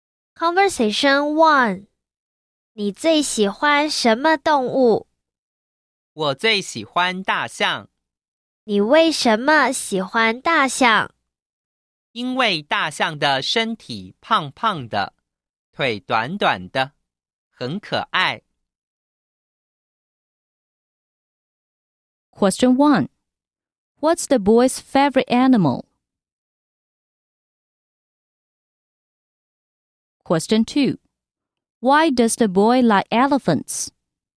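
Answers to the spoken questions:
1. Elephants
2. Their bodies are chubby and legs short, very cute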